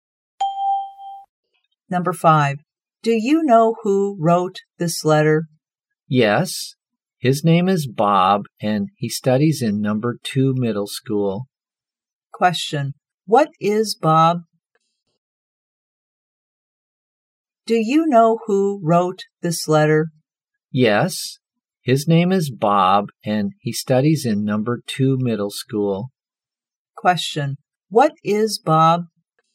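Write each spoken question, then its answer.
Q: what is Bob?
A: A student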